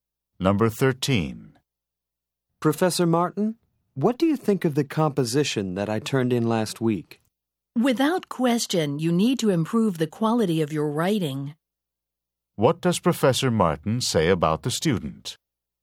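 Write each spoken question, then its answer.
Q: What does Professor Martin say about the student?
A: The student's writing needs to improve.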